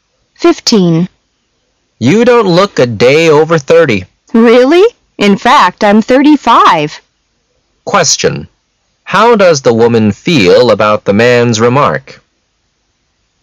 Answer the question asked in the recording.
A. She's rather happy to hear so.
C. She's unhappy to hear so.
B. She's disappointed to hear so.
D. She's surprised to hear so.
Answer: A. She's rather happy to hear so.

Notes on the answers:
M: You don't look a day over thirty. W: Really? In fact, I'm thirty-five. Q: How does the woman feel about the man's remark?